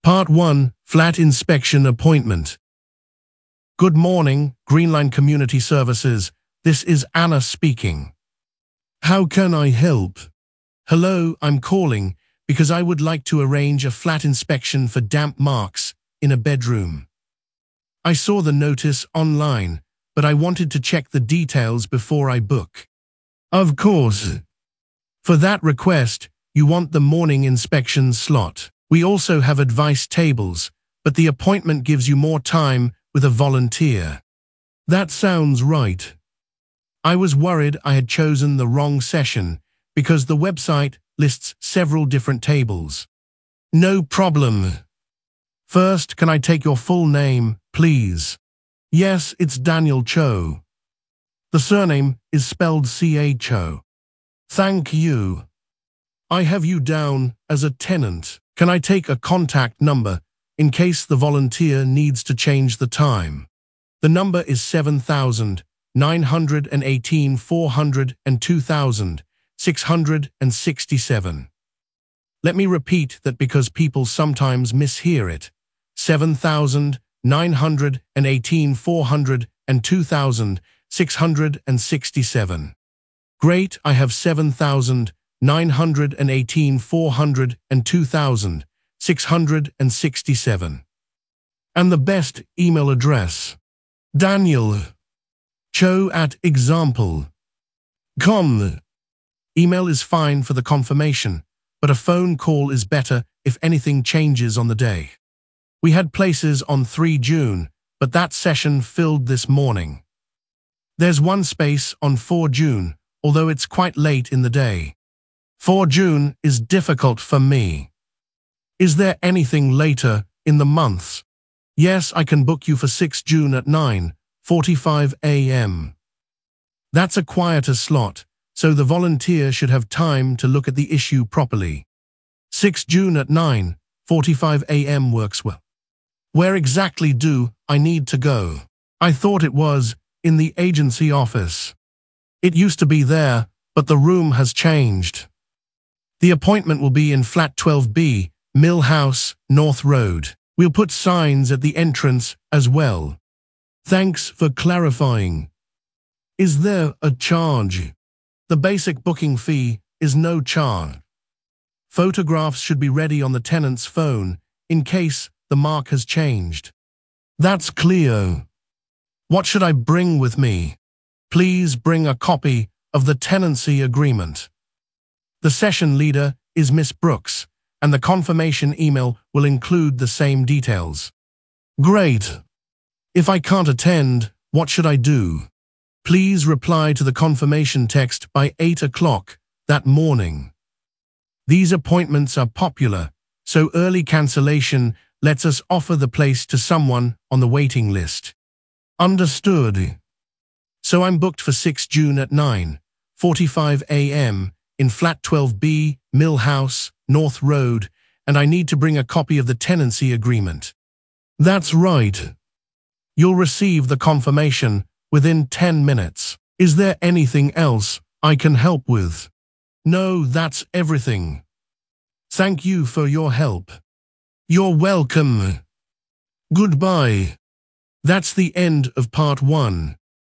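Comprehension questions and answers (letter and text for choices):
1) What does the caller want to arrange?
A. a refund appointment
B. flat inspection for damp marks in a bedroom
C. a library card renewal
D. a lecture ticket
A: B. flat inspection for damp marks in a bedroom

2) Which table or session does the receptionist recommend?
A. the advice-only table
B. the children's activity desk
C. the morning inspection slot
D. the information stand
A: C. the morning inspection slot

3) How is the caller's surname spelled?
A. C-H-O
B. P-A-R-T-E-L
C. M-A-R-T-I-N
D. W-R-I-T-E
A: A. C-H-O

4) What is the caller's final contact number?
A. 07118 402667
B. 07742 618953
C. 07366 914208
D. 07918 402667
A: D. 07918 402667

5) On what date is the appointment finally booked?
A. 3 June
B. 4 June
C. 6 June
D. the following Monday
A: C. 6 June

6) What time is the appointment?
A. 9:45 am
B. 9:00 am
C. 12:45 pm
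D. 4:30 pm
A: A. 9:45 am

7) Where will the appointment take place?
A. the agency office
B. Flat 12B, Mill House, North Road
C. the main library entrance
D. the visitor car park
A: B. Flat 12B, Mill House, North Road

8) How much is the basic fee?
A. twenty pounds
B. no deposit but parts only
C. no charge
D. one hundred pounds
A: C. no charge

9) What should the caller bring?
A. a passport photo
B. a bank statement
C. a printed map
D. a copy of the tenancy agreement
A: D. a copy of the tenancy agreement

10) What is the cancellation instruction?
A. send a replacement person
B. reply to the confirmation text by eight o'clock that morning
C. cancel after the appointment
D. wait for the volunteer to call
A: B. reply to the confirmation text by eight o'clock that morning

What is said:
Part 1: Flat Inspection Appointment
Receptionist: Good morning, Greenline Community Services, this is Anna speaking. 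How can I help?
Caller: Hello, I am calling because I would like to arrange a flat inspection for damp marks in a bedroom. I saw the notice online, but I wanted to check the details before I book.
Receptionist: Of course. For that request, you want the morning inspection slot. We also have advice tables, but the appointment gives you more time with a volunteer.
Caller: That sounds right. I was worried I had chosen the wrong session because the website lists several different tables.
Receptionist: No problem. First, can I take your full name, please?
Caller: Yes, it is Daniel Cho. The surname is spelled C-H-O.
Receptionist: Thank you. I have you down as a tenant. Can I take a contact number in case the volunteer needs to change the time?
Caller: The number is 07918 402667. Let me repeat that because people sometimes mishear it: 07918 402667.
Receptionist: Great, I have 07918 402667. And the best email address?
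Caller: daniel.cho@example.com. Email is fine for the confirmation, but a phone call is better if anything changes on the day.
Receptionist: We had places on 3 June, but that session filled this morning. There is one space on 4 June, although it is quite late in the day.
Caller: 4 June is difficult for me. Is there anything later in the month?
Receptionist: Yes, I can book you for 6 June at 9:45 am. That is a quieter slot, so the volunteer should have time to look at the issue properly.
Where exactly do I need to go? I thought it was in the agency office.
Receptionist: It used to be there, but the room has changed. The appointment will be in Flat 12B, Mill House, North Road. We will put signs at the entrance as well.
Caller: Thanks for clarifying. Is there a charge?
Receptionist: The basic booking fee is no charge. Photographs should be ready on the tenant's phone in case the mark has changed.
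Caller: That is clear. What should I bring with me?
Receptionist: Please bring a copy of the tenancy agreement. The session leader is Ms. Brooks, and the confirmation email will include the same details.
Caller: Great. If I cannot attend, what should I do?
Receptionist: Please reply to the confirmation text by eight o'clock that morning. These appointments are popular, so early cancellation lets us offer the place to someone on the waiting list.
Caller: Understood.
Is there anything else I can help with?
Caller: No, that is everything. Thank you for your help.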